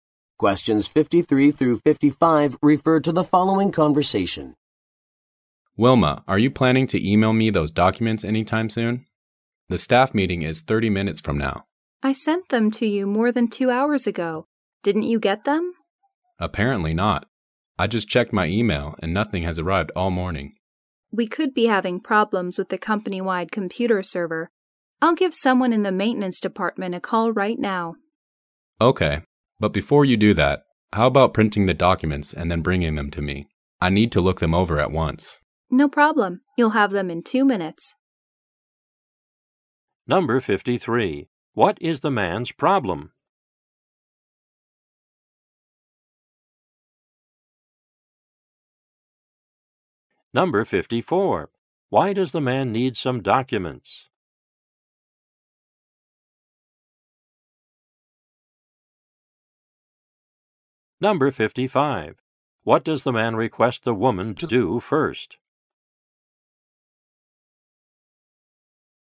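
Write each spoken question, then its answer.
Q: What is the man's problem?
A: He hasn't received the documents by email

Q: Why does the man need some documents?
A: For a staff meeting in 30 minutes

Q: What does the man request the woman to do first?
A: Print the documents and bring them to him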